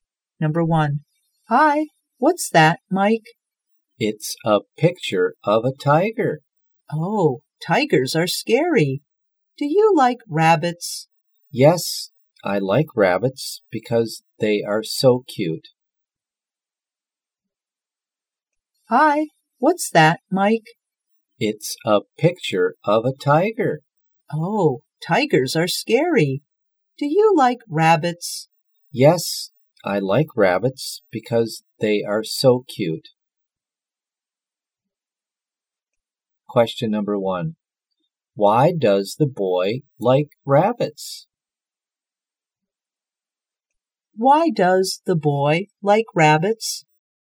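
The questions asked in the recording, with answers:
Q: Why does the boy like rabbits?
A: Because they are so cute.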